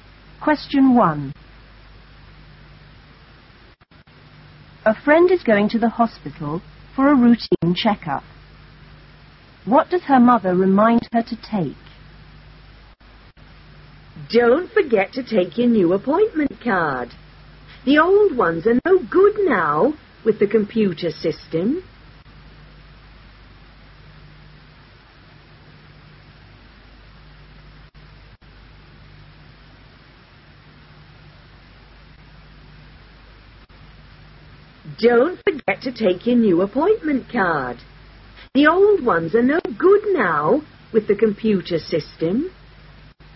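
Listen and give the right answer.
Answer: Her new appointment card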